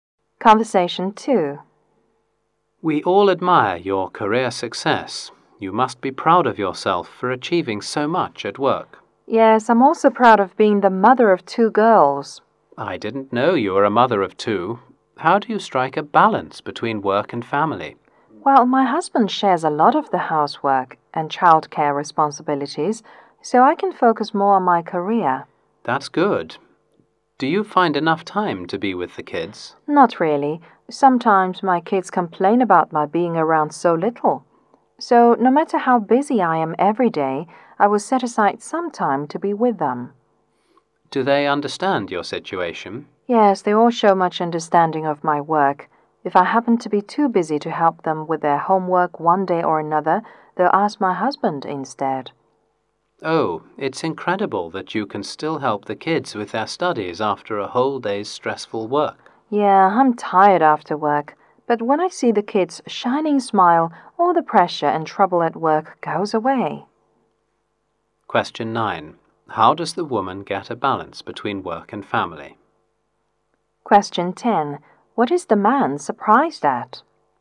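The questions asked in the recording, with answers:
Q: How does the woman get a balance between work and family?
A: Her husband shares the housework and childcare

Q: What is the man surprised at?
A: That she still helps the kids study after stressful work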